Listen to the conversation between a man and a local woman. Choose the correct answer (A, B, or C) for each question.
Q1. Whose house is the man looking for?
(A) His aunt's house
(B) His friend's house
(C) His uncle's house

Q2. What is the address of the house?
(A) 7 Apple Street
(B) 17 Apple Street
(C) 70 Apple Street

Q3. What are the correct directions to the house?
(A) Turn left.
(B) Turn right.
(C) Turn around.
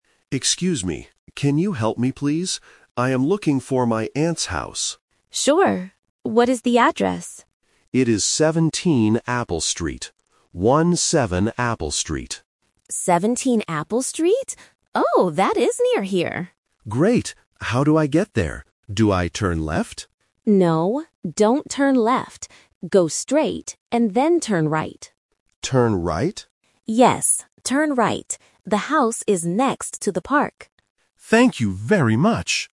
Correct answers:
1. A
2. B
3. B

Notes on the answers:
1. The man clearly says, "I am looking for my aunt's house." Option C (uncle's house) is another family word used as a distractor. Option B (friend's house) is a plausible reason to ask for directions, but it is not mentioned.
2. The man states the address is "17 Apple Street" and repeats the numbers "One-seven" to be very clear. Option C (70) is a phonetic trap because "seventeen" and "seventy" can sound very similar. Option A (7) is also a number trap.
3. The man asks, "Do I turn left?" (Option A is the trap). The woman says, "No, don't turn left. Go straight, and then turn right." She repeats "Turn right" to confirm. Option C (Turn around) is never mentioned.

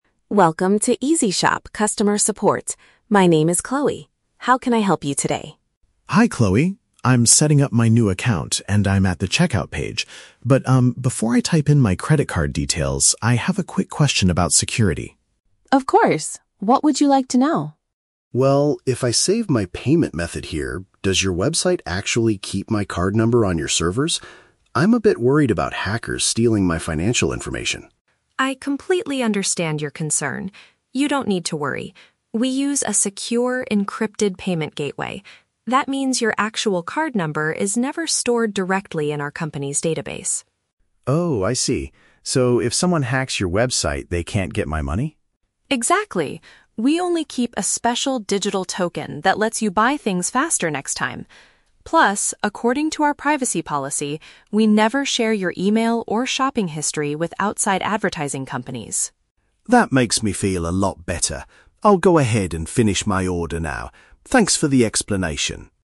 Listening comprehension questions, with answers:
Listen to the conversation between a customer and a customer service representative, and choose the correct answer (A, B, or C) for each question.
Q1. Why does the customer contact the support team?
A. He forgot the password to his newly created shopping account.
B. He wants to know how the website protects his payment details.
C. He noticed that internet criminals recently stole his money.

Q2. What does the representative say about the company's database?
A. It does not hold the real numbers of the customers' credit cards.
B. It frequently shares customer shopping history with advertising agencies.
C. It was recently attacked by hackers who stole special digital tokens.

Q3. What is the customer's final decision at the end of the call?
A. He decides to cancel his current order and log out.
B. He feels satisfied and is going to complete his transaction.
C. He asks the representative to delete his account immediately.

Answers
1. B
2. A
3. B

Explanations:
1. The customer says, "before I type in my credit card details, I have a quick question about security." Option B paraphrases this as wanting to know how the website protects his payment details. Why the traps are wrong: Option A is a plausible reason to call support, but he never mentions forgetting a password. Option C is a trap because he mentions "hackers stealing my financial information," but he is worried about this happening in the future; it has not actually happened yet.
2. The representative explains that "your actual card number is never stored directly in our company's database." Option A uses the synonym "does not hold" to express this. Why the traps are wrong: Option B is a trap because the audio mentions "shopping history" and "advertising companies," but the representative explicitly says they never share this information. Option C is incorrect because the company was not recently attacked; they only discussed hacking as a hypothetical situation.
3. The customer says, "That makes me feel a lot better. I'll go ahead and finish my order now." Option B uses the synonyms "satisfied" and "complete his transaction." Why the traps are wrong: Option A and Option C are traps. Because the customer feels safe after the explanation, he continues with his purchase rather than canceling his order or deleting his account.

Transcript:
My name is Chloe. How can I help you today?
Customer: Hi Chloe. I'm setting up my new account, and I'm at the checkout page. But, um, before I type in my credit card details, I have a quick question about security.
Rep: Of course. What would you like to know?
Customer: Well, if I save my payment method here, does your website actually keep my card number on your servers? I'm a bit worried about hackers stealing my financial information.
Rep: I completely understand your concern. You don't need to worry. We use a secure, encrypted payment gateway. That means your actual card number is never stored directly in our company's database.
Customer: Oh, I see. So if someone hacks your website, they can't get my money?
Rep: Exactly. We only keep a special digital token that lets you buy things faster next time. Plus, according to our privacy policy, we never share your email or shopping history with outside advertising companies.
Customer: That makes me feel a lot better. I'll go ahead and finish my order now. Thanks for the explanation!

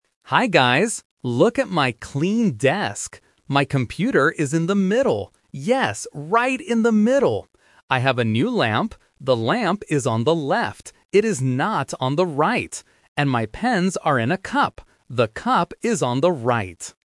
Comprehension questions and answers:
Listen to the audio and choose the correct answer (A, B, or C).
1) What is in the middle of the desk?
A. The computer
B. The lamp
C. A book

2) Where is the lamp?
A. On the right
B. On the left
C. In the middle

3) What is inside the cup on the right?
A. Water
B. A small plant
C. Pens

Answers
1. A
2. B
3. C

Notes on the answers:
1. The vlogger clearly says, "My computer is in the middle." Option (B) is a trap because the lamp is mentioned later, but it is on the left. Option (C) "A book" is a plausible item on a desk but is never mentioned.
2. The vlogger says, "The lamp is on the left." Option (A) is the trap because the speaker mentions "the right" but rejects it ("It is not on the right"). Option (C) is the trap for the computer's location.
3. The vlogger states, "And my pens are in a cup. The cup is on the right." Options (A) and (B) are plausible things to put in a cup on a desk, but they are not mentioned in the audio.

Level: A1

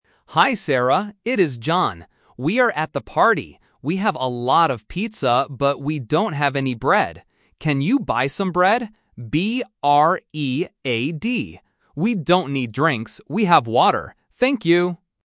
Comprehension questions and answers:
Listen to a voicemail from a friend and choose the correct answer (A, B, or C) for each question.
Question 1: What does John want Sarah to buy?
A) Pizza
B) Bread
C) Water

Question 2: How does John spell the food he wants?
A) B-R-E-A-D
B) B-R-A-D-E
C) B-R-E-E-D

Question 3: What food do they already have a lot of at the party?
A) Bread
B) Chicken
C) Pizza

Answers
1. B
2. A
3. C

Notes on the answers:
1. John explicitly asks, "Can you buy some bread?" Option (A) Pizza is The Trap: pizza is mentioned, but he says they already have a lot of it. Option (C) Water is also The Trap: he says they already have water and don't need drinks.
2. John spells the word for the food he wants very clearly: "B-R-E-A-D". Options (B) and (C) are incorrect spellings with similar sounds.
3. John says, "We have a lot of pizza." Option (A) Bread is incorrect because it is the item they lack and need Sarah to buy. Option (B) Chicken is a plausible party food but is not mentioned in the audio.

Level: A1

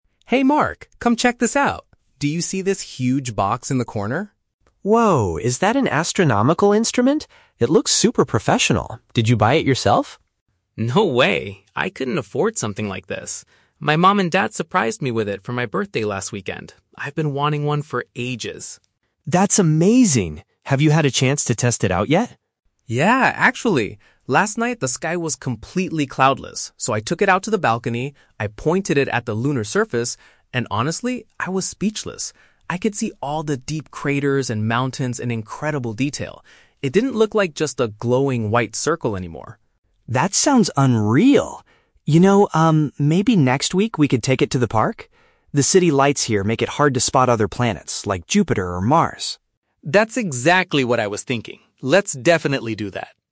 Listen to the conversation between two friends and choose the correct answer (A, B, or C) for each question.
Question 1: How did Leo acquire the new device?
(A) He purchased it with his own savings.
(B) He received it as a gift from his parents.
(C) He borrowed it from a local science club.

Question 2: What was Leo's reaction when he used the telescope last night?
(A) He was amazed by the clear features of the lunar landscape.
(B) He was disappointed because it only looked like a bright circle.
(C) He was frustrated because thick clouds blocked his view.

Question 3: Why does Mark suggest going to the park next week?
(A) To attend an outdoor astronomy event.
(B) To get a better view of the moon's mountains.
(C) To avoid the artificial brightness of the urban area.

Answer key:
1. B
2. A
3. C

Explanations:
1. Leo states that his "mom and dad surprised me with it for my birthday" (mom and dad = parents; surprised with it for birthday = gift). Option (A) is The Trap: Mark asks if he bought it himself, but Leo rejects this, saying "I couldn't afford something like this." Option (C) is plausible but never mentioned.
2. Leo says he was "speechless" (amazed) because he could see the "deep craters and mountains in incredible detail" (features of the lunar landscape). Option (B) is The Trap: He mentions the moon "didn't look like just a glowing white circle anymore," meaning he was not disappointed. Option (C) is incorrect because he explicitly says the sky was "completely cloudless."
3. Mark suggests the park because "The city lights here make it hard to spot other planets" (city lights = artificial brightness of the urban area). Option (A) is not mentioned. Option (B) is The Trap: They already saw the moon perfectly from the balcony; the goal of going to the park is to see other planets, not the moon.

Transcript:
Leo: Hey Mark, come check this out! Do you see this huge box in the corner?
Mark: Whoa, is that an astronomical instrument? It looks super professional. Did you buy it yourself?
Leo: No way, I couldn't afford something like this. My mom and dad surprised me with it for my birthday last weekend. I've been wanting one for ages.
Mark: That's amazing! Have you had a chance to test it out yet?
Leo: Yeah, actually. Last night, the sky was completely cloudless, so I took it out to the balcony. I pointed it at the lunar surface, and honestly, I was speechless. I could see all the deep craters and mountains in incredible detail. It didn't look like just a glowing white circle anymore.
Mark: That sounds unreal! You know, um, maybe next week we could take it to the park? The city lights here make it hard to spot other planets, like Jupiter or Mars.

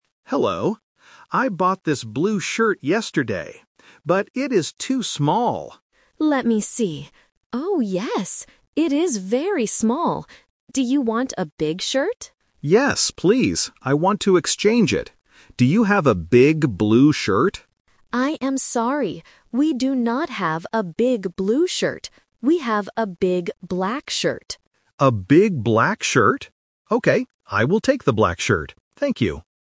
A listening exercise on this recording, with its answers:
Listen to the conversation between a customer and a shop assistant. Choose the correct answer (A, B, or C) for each question.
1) What did the customer buy yesterday?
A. A black shirt.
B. A blue shirt.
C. A blue hat.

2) What is the problem with the shirt?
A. It is too big.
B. It is too small.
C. It is very old.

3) What color is the new shirt?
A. Blue.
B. Black.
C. Green.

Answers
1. B
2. B
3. B

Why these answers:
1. The customer clearly says in the first sentence, "I bought this blue shirt yesterday." Option A (A black shirt) is the trap because it is the color of the new shirt he takes at the end. Option C is not mentioned.
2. The customer explicitly states, "But it is too small." The assistant also repeats, "it is very small." Option A (too big) is the trap because the customer wants a big shirt, but the current one is small. Option C is not mentioned.
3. The assistant says they have a "big black shirt". The customer agrees to take it. Option A (Blue) is the trap because the customer asks for a big blue shirt, but the assistant says "We do not have a big blue shirt." Option C is not mentioned.

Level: A1

